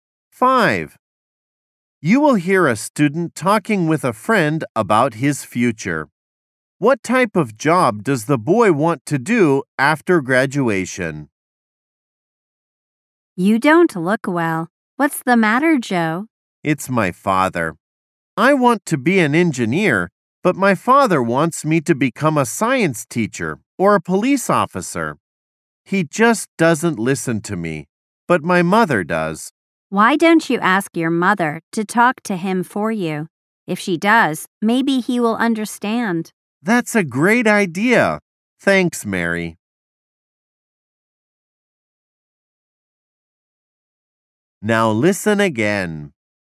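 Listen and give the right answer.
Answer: Engineer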